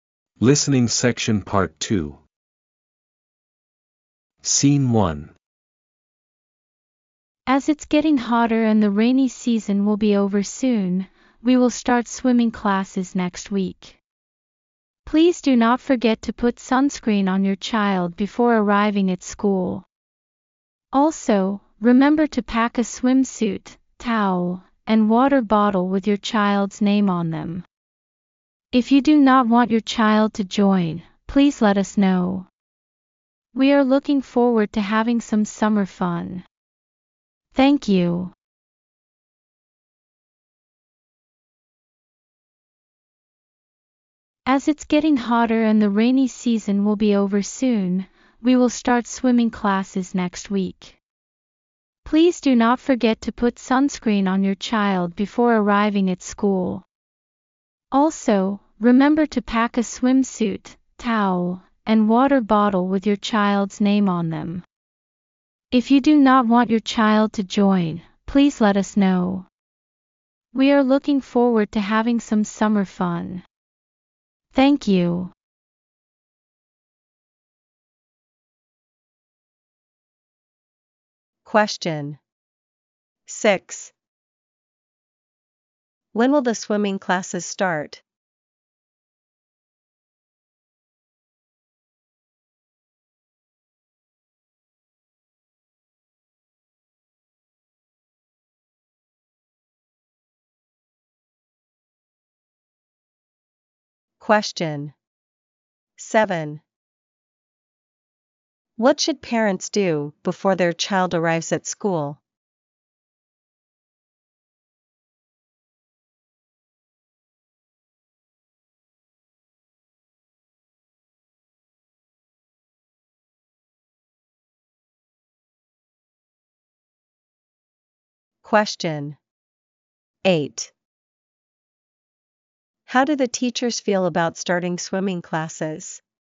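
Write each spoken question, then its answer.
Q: When will the swimming classes start?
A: Next week

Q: What should parents do before their child arrives at school?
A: Put sunscreen on their child

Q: How do the teachers feel about starting swimming classes?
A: They are looking forward to it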